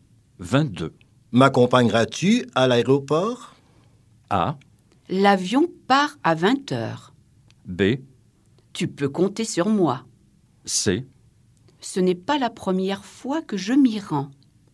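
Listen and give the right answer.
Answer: B: Tu peux compter sur moi.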